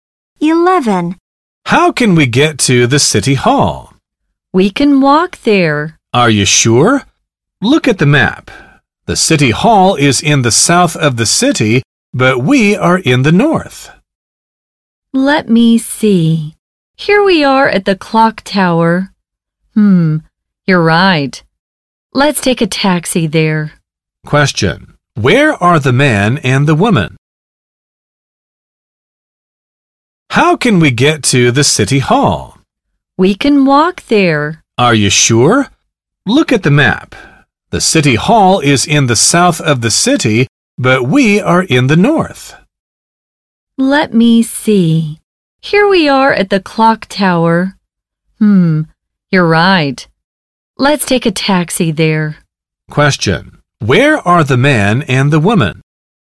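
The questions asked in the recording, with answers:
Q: Where are the man and the woman?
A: At the clock tower, in the north of the city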